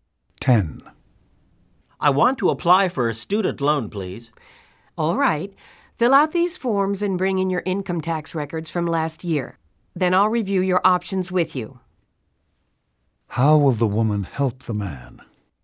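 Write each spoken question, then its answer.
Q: How will the woman help the man?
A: She will review his loan options after he fills out forms and brings tax records.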